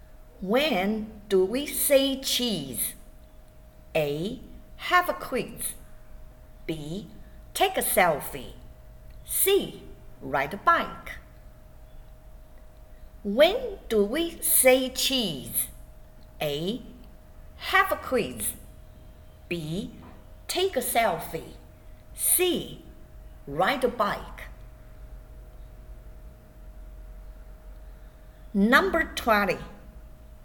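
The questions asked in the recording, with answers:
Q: When do we say cheese?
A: B: Take a selfie.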